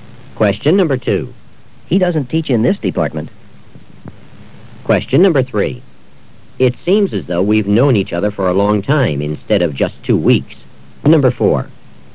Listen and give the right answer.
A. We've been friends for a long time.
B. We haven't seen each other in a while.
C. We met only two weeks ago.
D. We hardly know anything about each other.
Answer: C. We met only two weeks ago.

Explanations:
It seems as though we've known each other for a long time instead of just two weeks.

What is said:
It seems as though we've known each other for a long time instead of just two weeks.